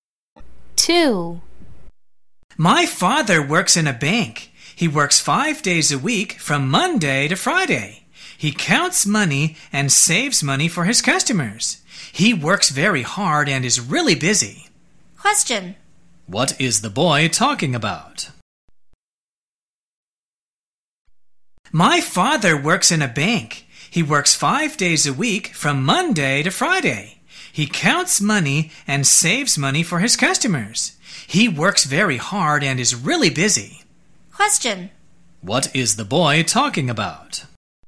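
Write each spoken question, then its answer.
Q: What is the boy talking about?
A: His father's job at a bank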